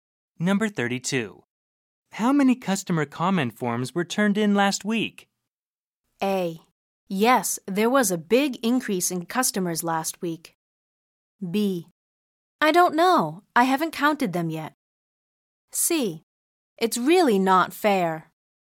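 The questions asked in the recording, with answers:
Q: How many customer comment forms were turned in last week?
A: B: I don't know. I haven't counted them yet.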